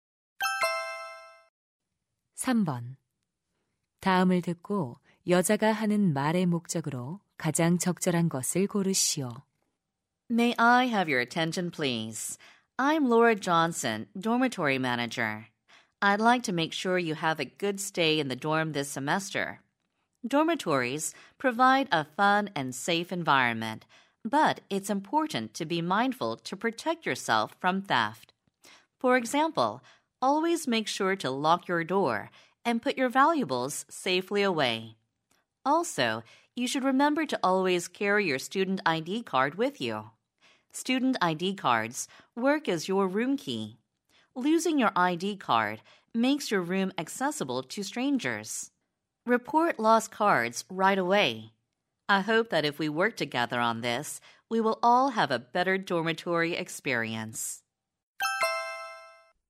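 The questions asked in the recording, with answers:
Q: 다음을 듣고 여자가 하는 말의 목적으로 가장 적절한 것을 고르시오.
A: 기숙사 내 도난 예방을 위한 주의 사항을 안내하려고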